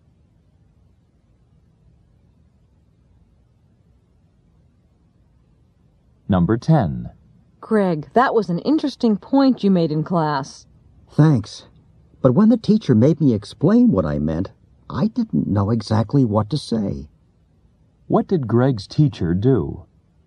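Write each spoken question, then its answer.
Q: What did Greg's teacher do?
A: She made Greg explain what he meant.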